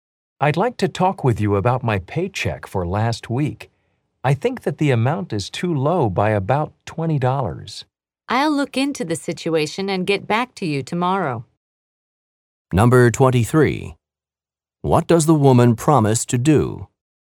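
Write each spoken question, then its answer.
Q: What does the woman promise to do?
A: Look into the paycheck problem and get back to him tomorrow.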